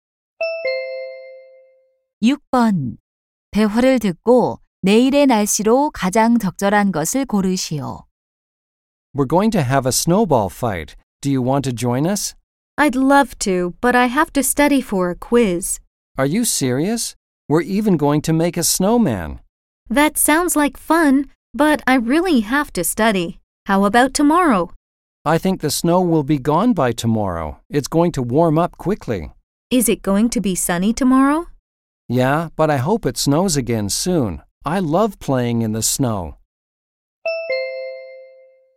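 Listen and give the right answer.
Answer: 맑고 따뜻함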